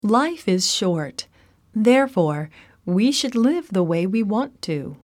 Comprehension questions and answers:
英文の音声を聞いて空所のことばを記入しなさい。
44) Life is short; ( ) we should ( ) ( ) ( ) we ( ) ( ).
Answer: therefore, live the way, want to